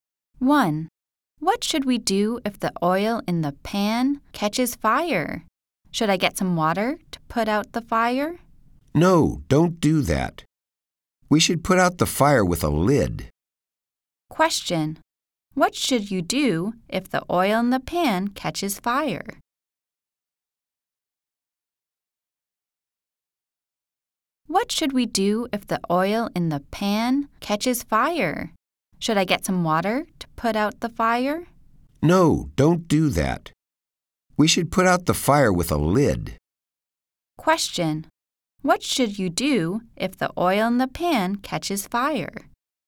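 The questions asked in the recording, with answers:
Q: What should you do if the oil in the pan catches fire?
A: Put out the fire with a lid.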